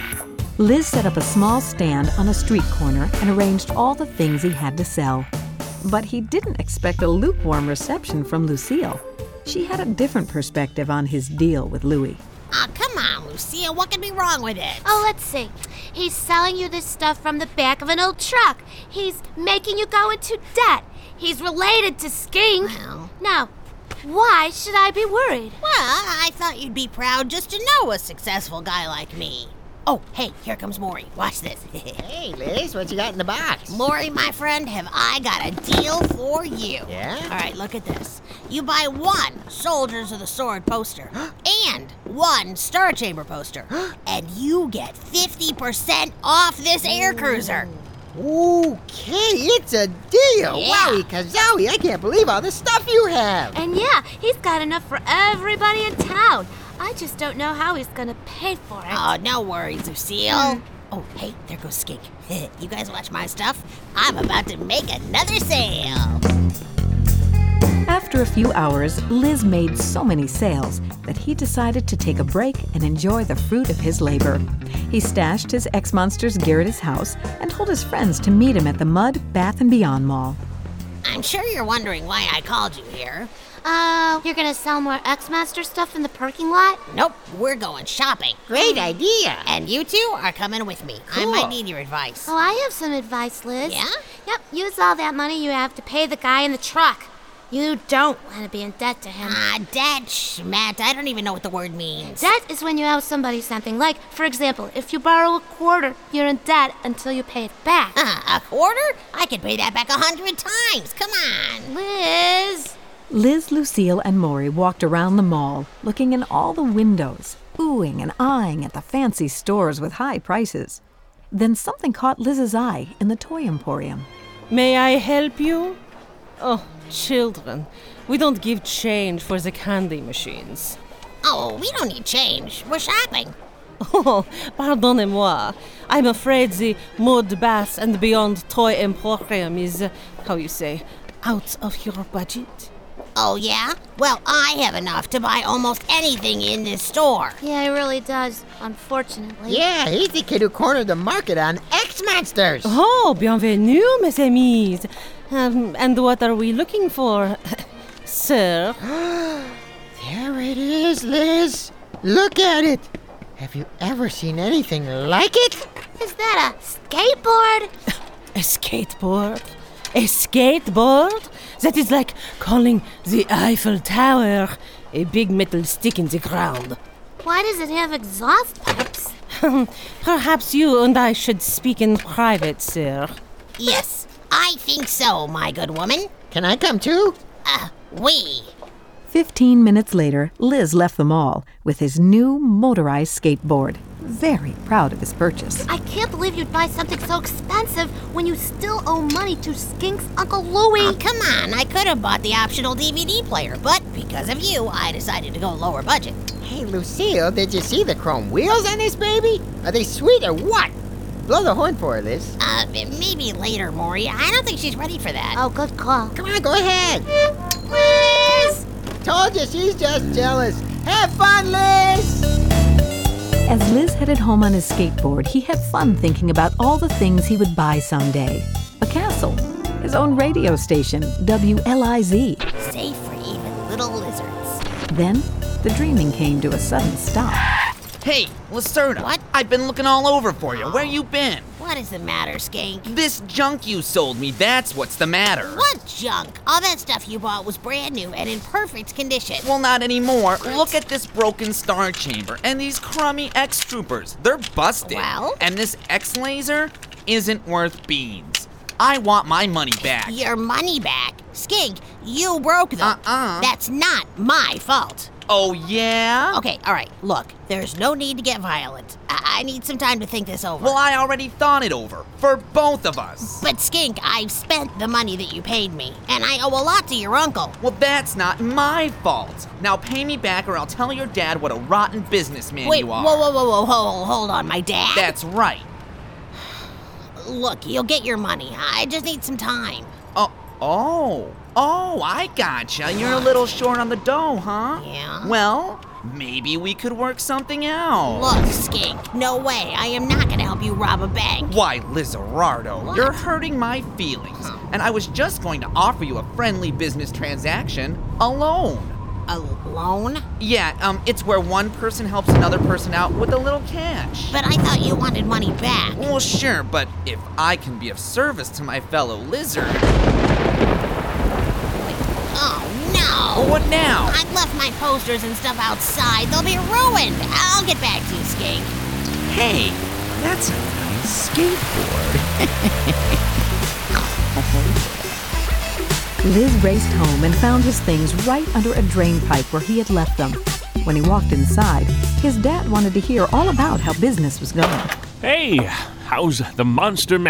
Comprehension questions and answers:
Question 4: What does he do with the money he makes?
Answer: Buys a skateboard.

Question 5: Who offers him a loan?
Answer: Skink.